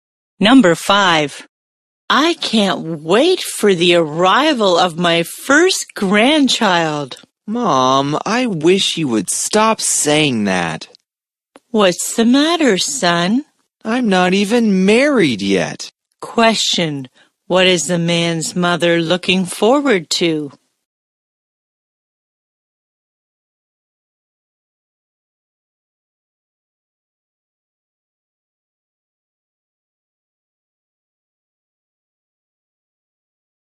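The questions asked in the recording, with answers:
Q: Question, what is the man's mother looking forward to?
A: The arrival of her first grandchild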